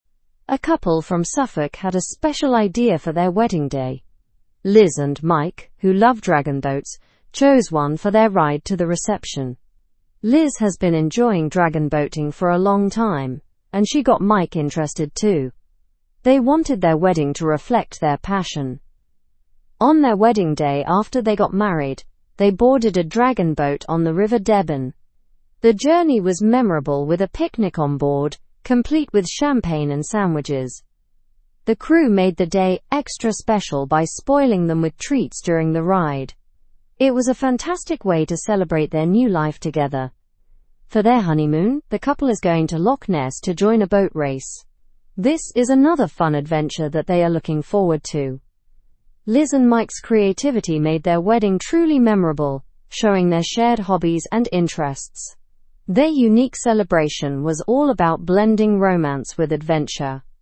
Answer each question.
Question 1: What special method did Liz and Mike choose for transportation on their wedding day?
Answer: A dragon boat.

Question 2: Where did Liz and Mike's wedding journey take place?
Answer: On the River Deben.

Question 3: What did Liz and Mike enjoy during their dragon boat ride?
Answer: A picnic with champagne and sandwiches.

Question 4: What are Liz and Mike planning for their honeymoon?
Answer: A trip to Loch Ness to join a boat race.

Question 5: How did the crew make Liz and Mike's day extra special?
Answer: By spoiling them with treats.

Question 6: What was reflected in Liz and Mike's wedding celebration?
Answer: Their shared hobbies and interests.

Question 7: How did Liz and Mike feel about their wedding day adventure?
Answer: They found it memorable and special.

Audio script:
A couple from Suffolk had a special idea for their wedding day. Liz and Mike, who love dragon boats, chose one for their ride to the reception. Liz has been enjoying dragon boating for a long time, and she got Mike interested too. They wanted their wedding to reflect their passion.
On their wedding day, after they got married, they boarded a dragon boat on the River Deben. The journey was memorable with a picnic on board, complete with champagne and sandwiches. The crew made the day extra special by spoiling them with treats during the ride. It was a fantastic way to celebrate their new life together.
For their honeymoon, the couple is going to Loch Ness to join a boat race. This is another fun adventure that they are looking forward to. Liz and Mike's creativity made their wedding truly memorable, showing their shared hobbies and interests.

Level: Level 2